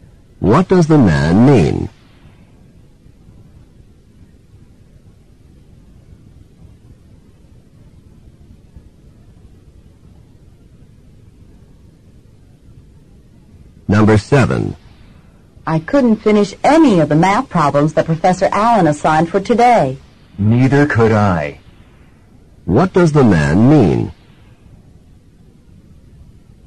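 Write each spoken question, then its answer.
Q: What does the man mean?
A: He couldn't finish the math problems either.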